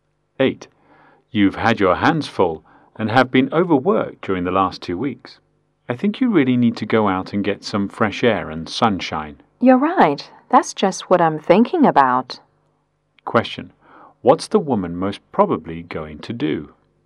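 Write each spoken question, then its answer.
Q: What's the woman most probably going to do?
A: Go out for some fresh air and sunshine.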